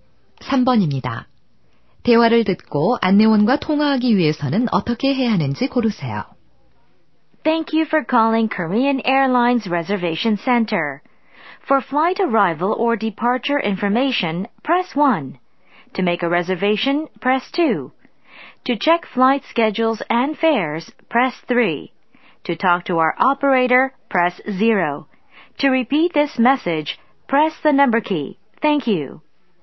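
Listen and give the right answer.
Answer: 0번을 누른다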